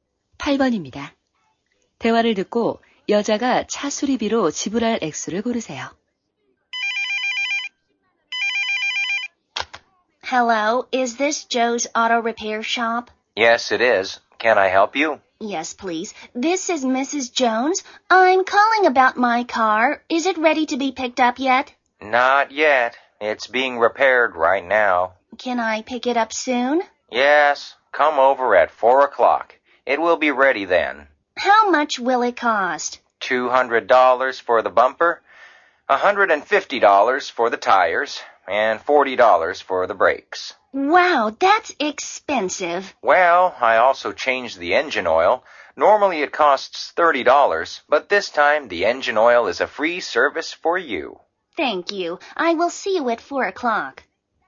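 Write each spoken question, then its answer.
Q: 대화를 듣고 여자가 차 수리비로 지불할 액수를 고르세요.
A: 390달러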